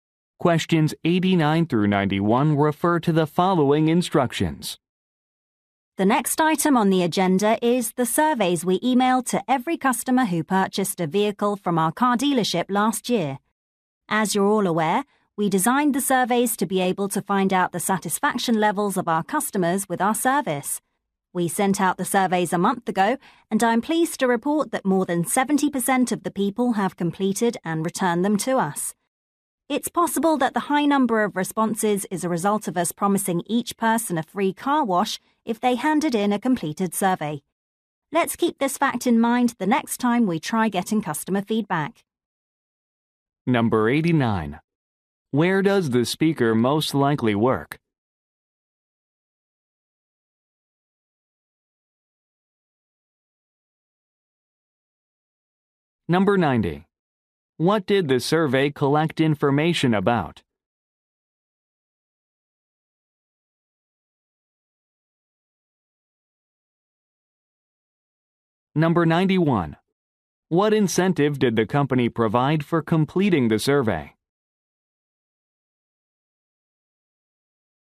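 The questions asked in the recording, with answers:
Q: Where does the speaker most likely work?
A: At a car dealership

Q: What did the survey collect information about?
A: Customer satisfaction with the service

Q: What incentive did the company provide for completing the survey?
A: A free car wash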